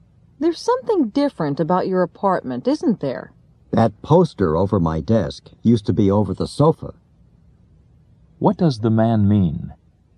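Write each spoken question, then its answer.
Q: What does the man mean?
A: He moved the poster from over the sofa to over his desk.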